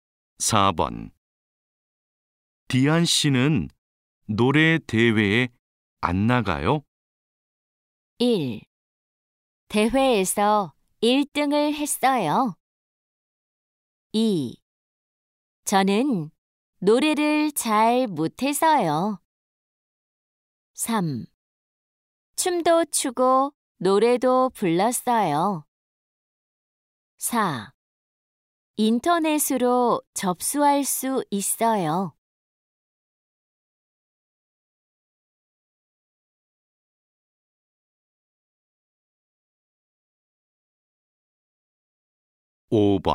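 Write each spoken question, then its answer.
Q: 디안 씨는 노래 대회에 안 나가요?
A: 2: 저는 노래를 잘 못해서요.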